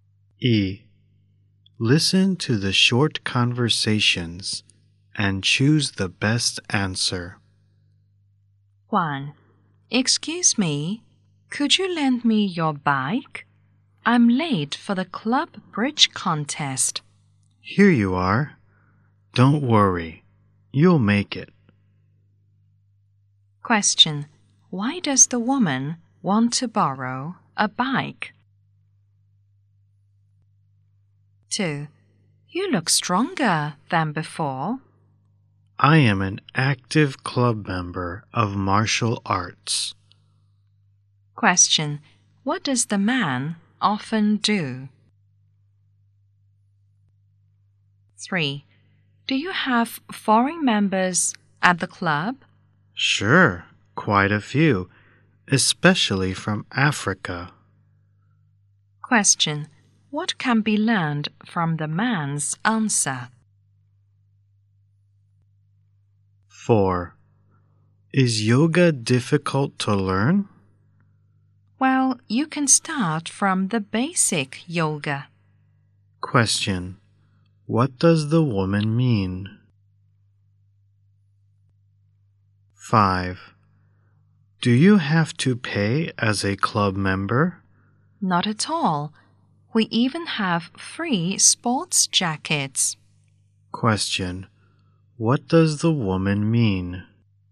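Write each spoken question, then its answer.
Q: Why does the woman want to borrow a bike?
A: She is late for the club bridge contest.

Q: What does the man often do?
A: He practices martial arts at a club.

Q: What can be learned from the man's answer?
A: The club has quite a few foreign members, especially from Africa.

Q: What does the woman mean?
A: Club members don't have to pay; they even get free sports jackets.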